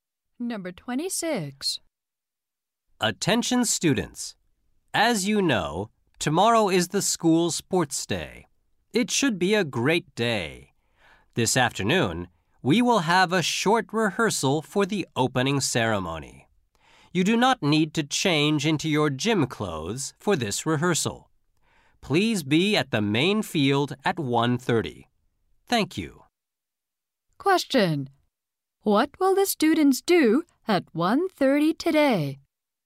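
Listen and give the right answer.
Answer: Have a rehearsal for the opening ceremony.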